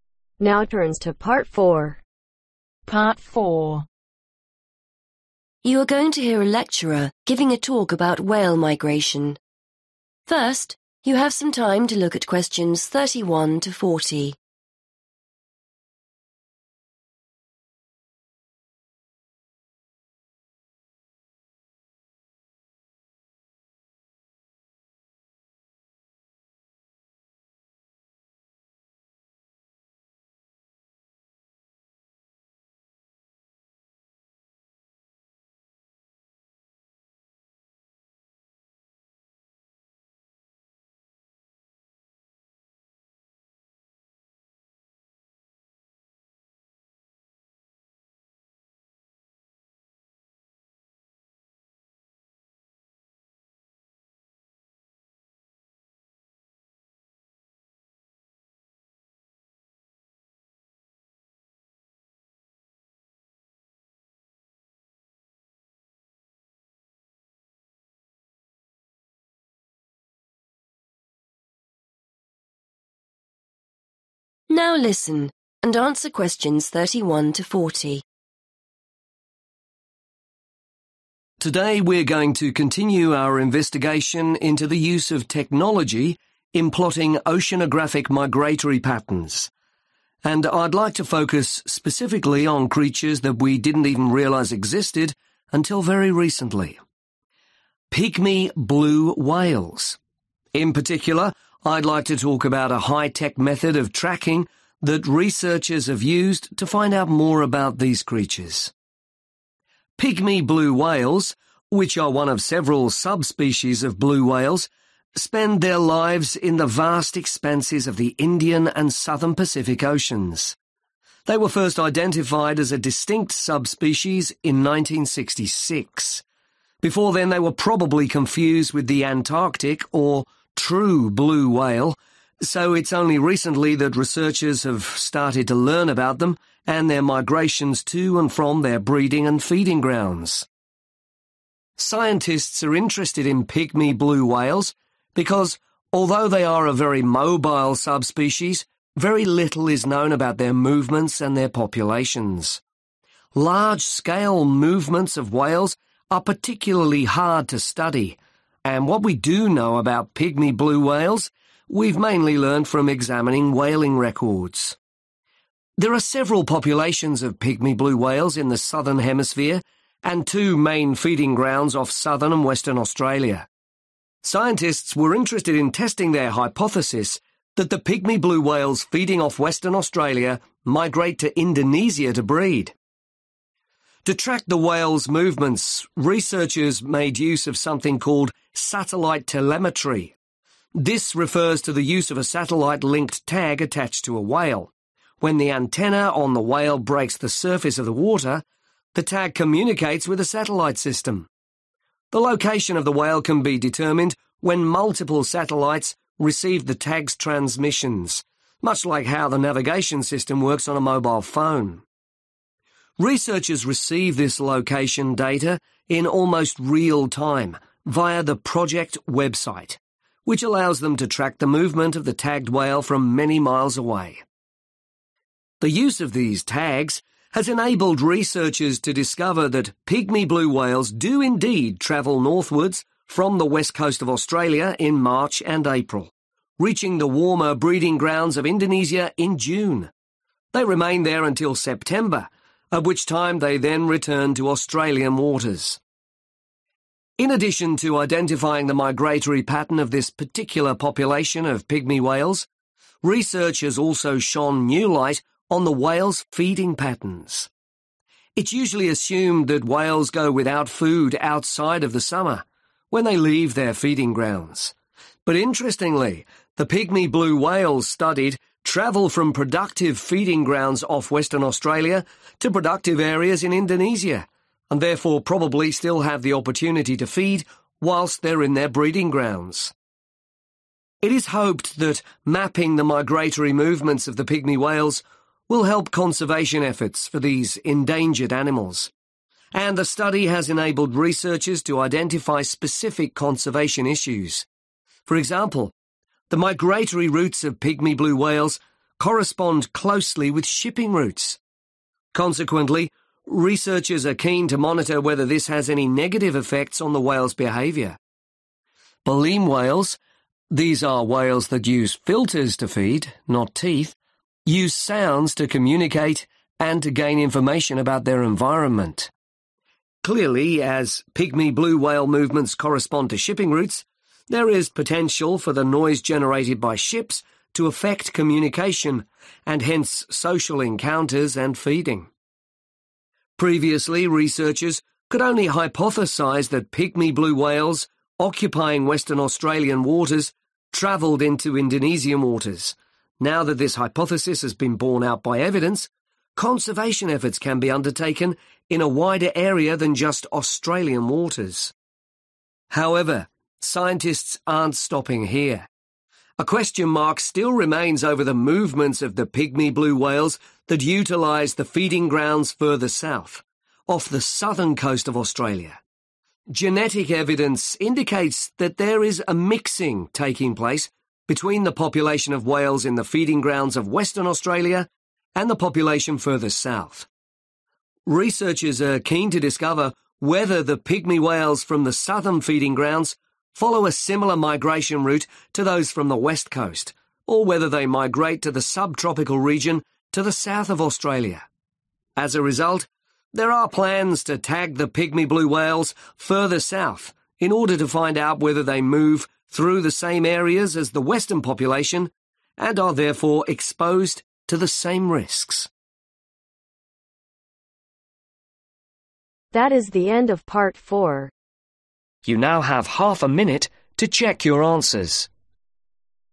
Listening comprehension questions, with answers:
Complete the lecture notes below. Write ONE WORD ONLY for each answer.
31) Pygmy blue whales: Before 1966 it is likely they were (31) ............ with the Antarctic blue whales.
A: confused

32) Aim of study: To find out more about their (32) ............ and movements.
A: population(s)

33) When the antenna communicates with a number of satellite, the whale's (33) ............ can be identified.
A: location

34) Researchers access the results using the project (34) ............ .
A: website

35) Finding: The whales travel from the (35) ............ coast of Australia to breeding in Indonesia during March and April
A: west

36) and return to Australian waters in (36) ............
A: September

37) Pygmy whales do not go without (37) ............ whilst they are in their breeding grounds.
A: food / feeding

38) Conservation issues: The effect of (38) ............ routes on communication whales.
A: shipping

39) Conservation efforts can take place over a(n) (39) ............ area now there is evidence that they migrate out to Australian water.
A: wider

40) or whether they travel ta a(n) (40) ............ region to south of Australia.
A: sub-tropical / subtropical